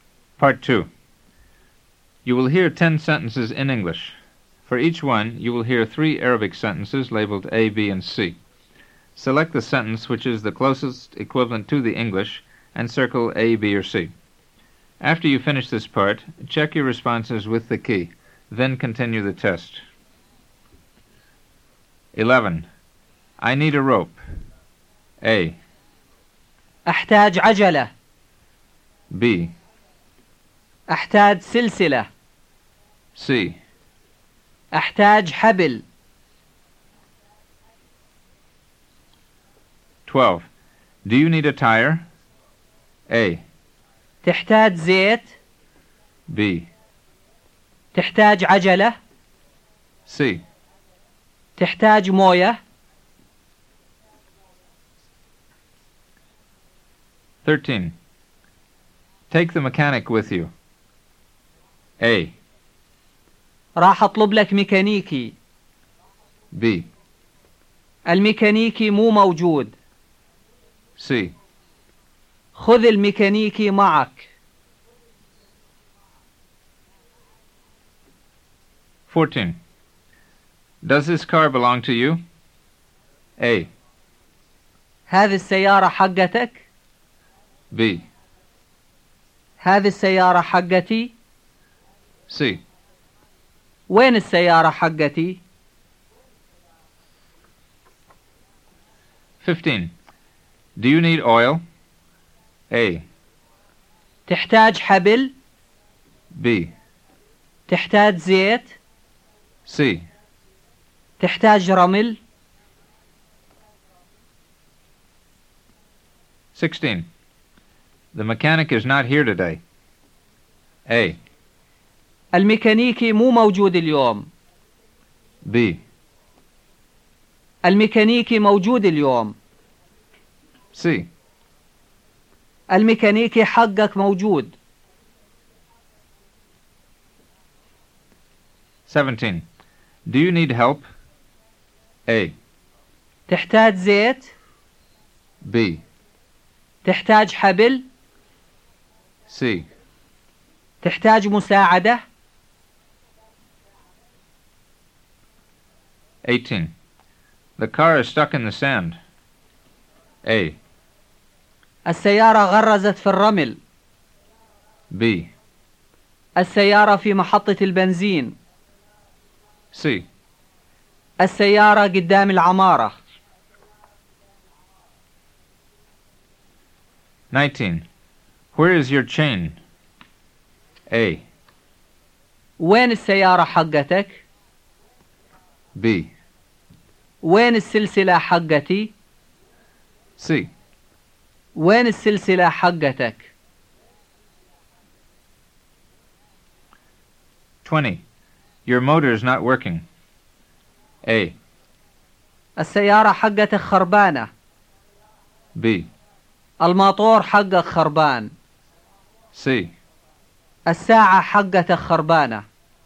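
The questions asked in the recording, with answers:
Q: I need a rope.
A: C: أحتاج حبل.

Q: Do you need a tire?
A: B: تحتاج عجلة.

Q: Take the mechanic with you.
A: C: خذ الميكانيكي معك.

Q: Does this car belong to you?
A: A: هذه السيارة حقتك؟

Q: Do you need oil?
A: B: تحتاج زيت؟

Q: The mechanic is not here today.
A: A: الميكانيكي مو موجود اليوم.

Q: Do you need help?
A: C: تحتاج مساعدة؟

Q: The car is stuck in the sand.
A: A: السيارة غرزت في الرمل.

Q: Where is your chain?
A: C: وين السلسلة حقتك؟

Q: Your motor is not working.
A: B: الماطور حقك خربان.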